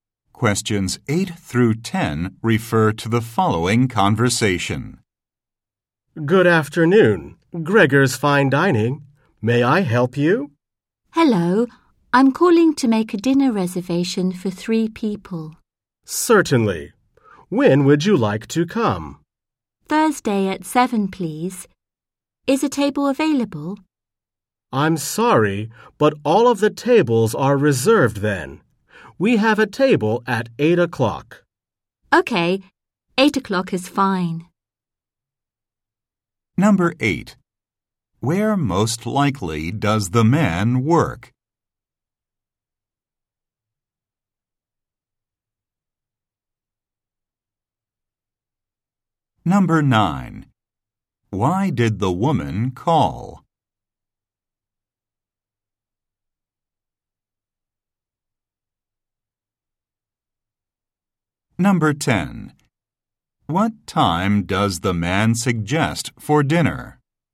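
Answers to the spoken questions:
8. At a restaurant (Gregor's Fine Dining)
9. To make a dinner reservation
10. 8 o'clock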